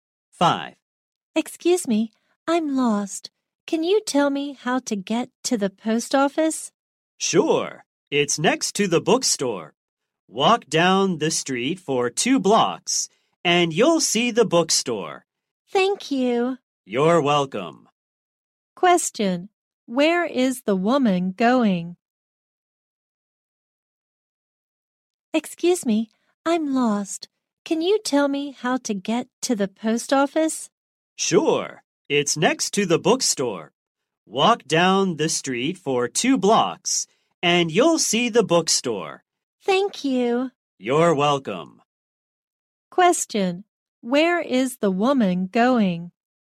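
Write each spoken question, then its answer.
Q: Question, where is the woman going?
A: To the post office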